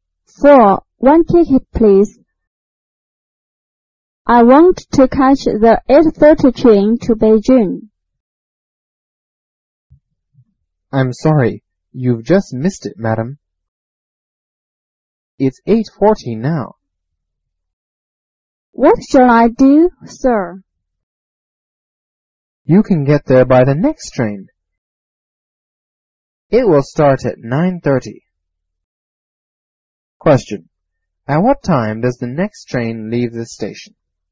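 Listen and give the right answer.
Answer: At 9:30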